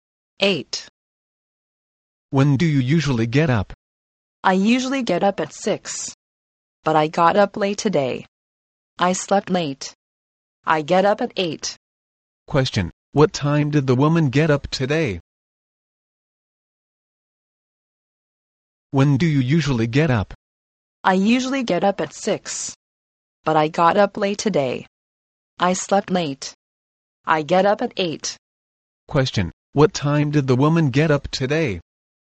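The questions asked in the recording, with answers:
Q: Question, what time did the woman get up today?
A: At 8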